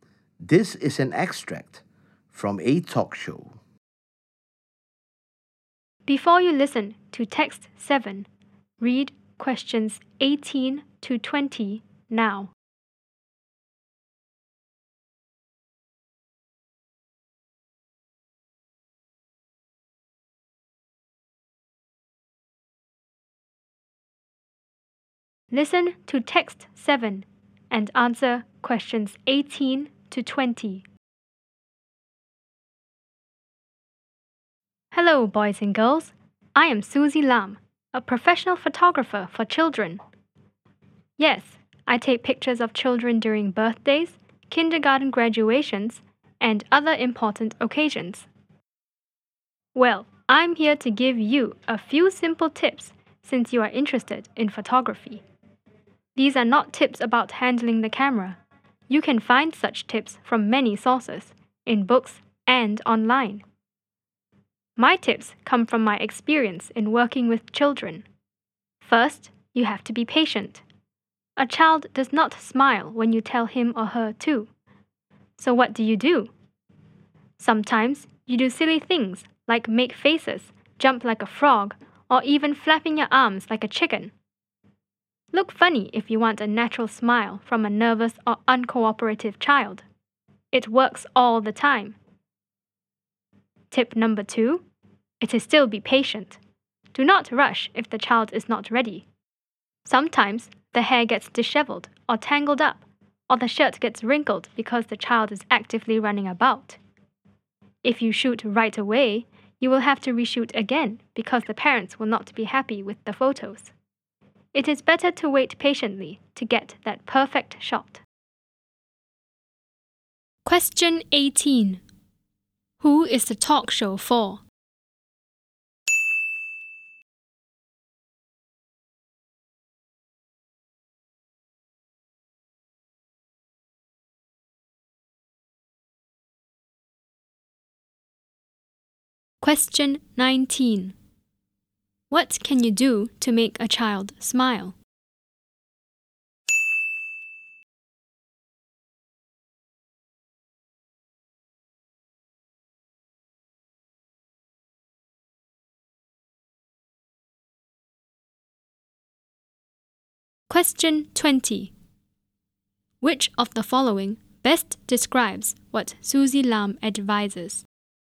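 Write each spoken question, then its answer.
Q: Who is the talk show for?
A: Boys and girls who are interested in photography

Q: What can you do to make a child smile?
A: Do silly things and look funny, like making faces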